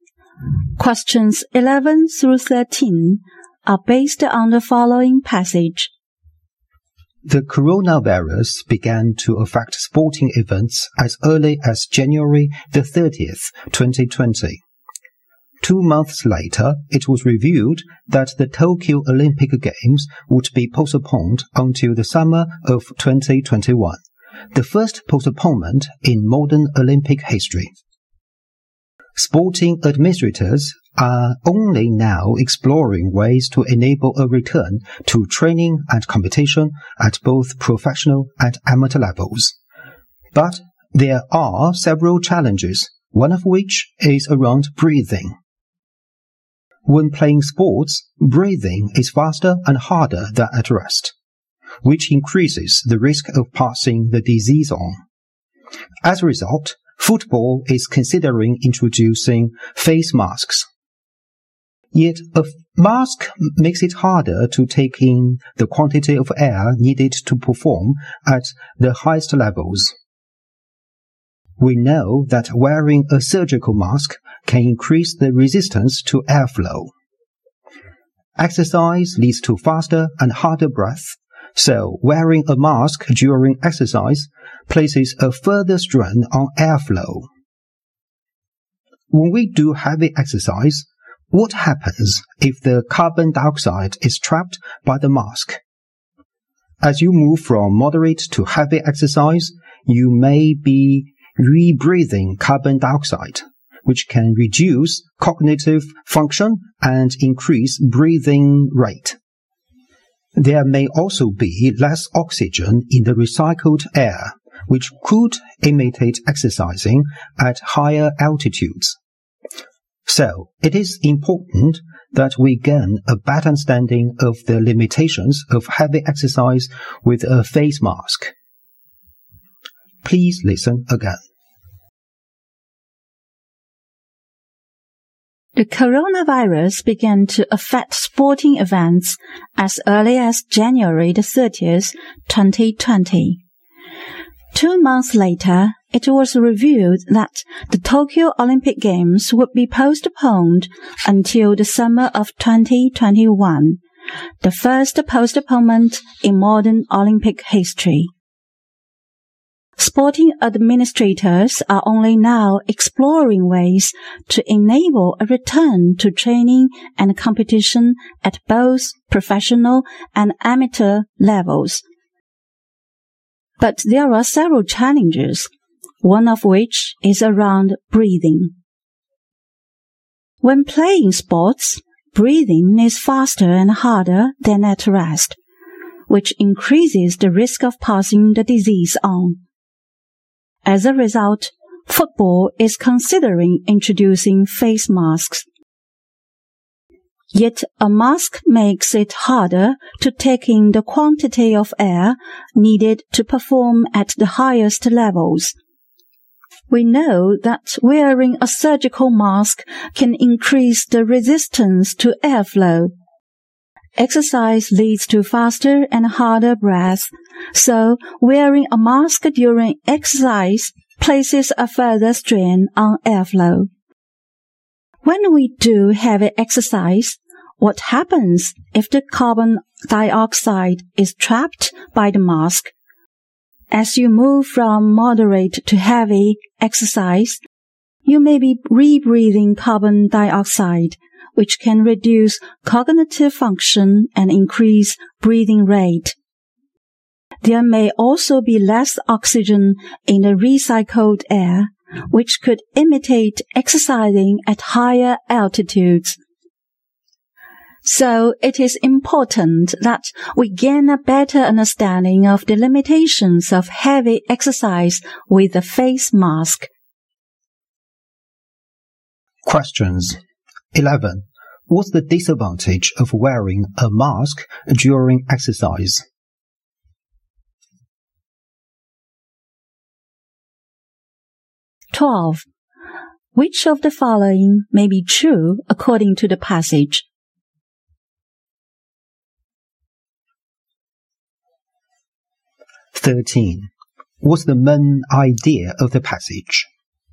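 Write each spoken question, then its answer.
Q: What's the disadvantage of wearing a mask during exercise?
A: It makes it harder to take in enough air.

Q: What's the main idea of the passage?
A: The challenges of exercising with a face mask during the coronavirus.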